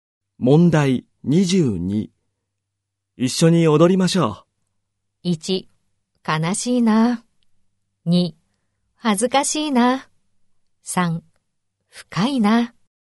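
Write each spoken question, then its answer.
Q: 一緒に踊りましょう。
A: 2: 恥ずかしいな。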